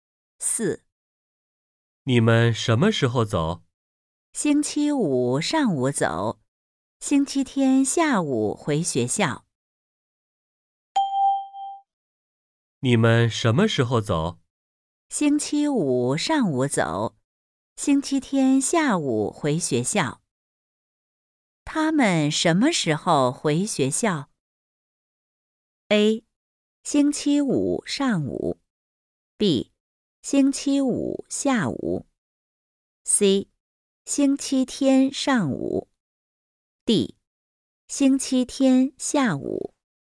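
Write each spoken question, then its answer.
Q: 他们什么时候回学校?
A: D: 星期天下午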